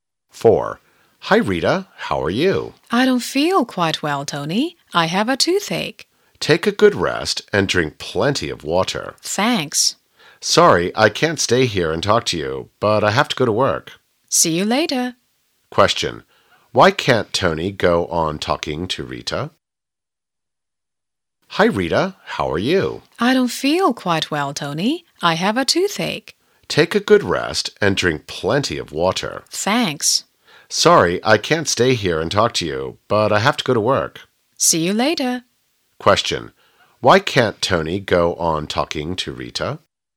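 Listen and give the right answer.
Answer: He has to go to work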